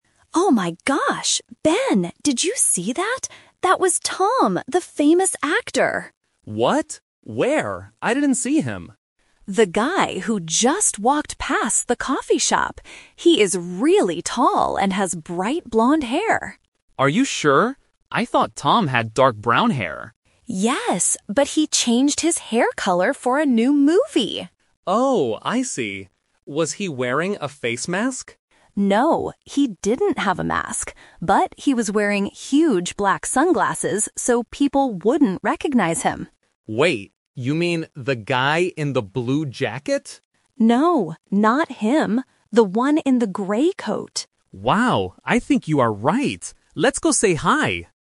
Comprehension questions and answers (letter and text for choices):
Listen to the conversation and choose the correct answer (A, B, or C).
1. What color is the actor's hair NOW?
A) Dark brown.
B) Bright blonde.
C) Black.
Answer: B) Bright blonde.

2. What is the actor wearing on his face?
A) A face mask.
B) Regular reading glasses.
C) Huge black sunglasses.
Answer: C) Huge black sunglasses.

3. What clothes is the actor wearing?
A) A blue jacket.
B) A grey coat.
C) A black shirt.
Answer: B) A grey coat.

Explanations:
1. Anna clearly says the actor has "bright blonde hair." The Trap: Option (A) is the "Twist". Ben thought the actor had dark brown hair, but Anna explains that he changed his hair color for a new movie. Option (C) is not mentioned.
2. Anna states, "he was wearing huge black sunglasses." The Trap: Option (A) is a trap because Ben asks, "Was he wearing a face mask?", but Anna immediately says "No."
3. Anna confirms the actor is "The one in the grey coat!" The Trap: Option (A) is a trap because Ben guesses it is the guy in the "blue jacket", but Anna says "No, not him."

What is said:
Anna: Oh my gosh! Ben, did you see that? That was Tom, the famous actor!
Ben: What? Where? I didn't see him.
Anna: The guy who just walked past the coffee shop! He is really tall and has bright blonde hair.
Ben: Are you sure? I thought Tom had dark brown hair.
Anna: Yes, but he changed his hair color for a new movie!
Ben: Oh, I see. Was he wearing a face mask?
Anna: No, he didn't have a mask. But he was wearing huge black sunglasses so people wouldn't recognize him.
Ben: Wait, you mean the guy in the blue jacket?
Anna: No, not him. The one in the grey coat!